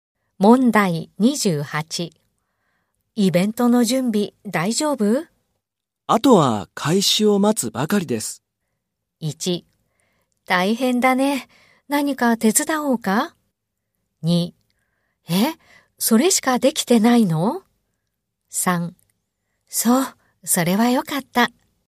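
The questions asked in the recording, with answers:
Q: イベントの準備大丈夫?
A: 3: そう、それはよかった。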